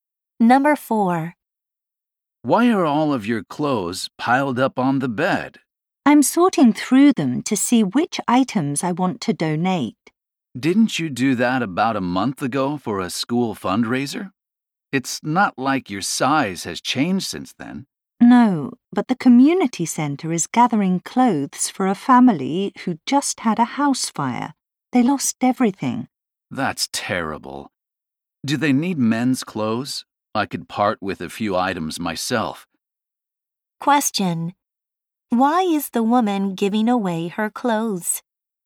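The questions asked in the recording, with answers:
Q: Why is the woman giving away her clothes?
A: To help a family who lost everything in a house fire.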